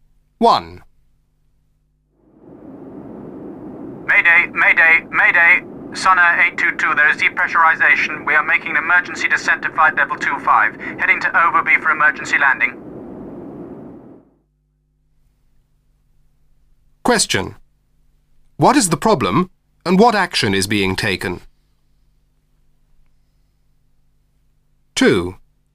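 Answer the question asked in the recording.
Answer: Depressurization; emergency descent to flight level 25 and diverting to Overby for an emergency landing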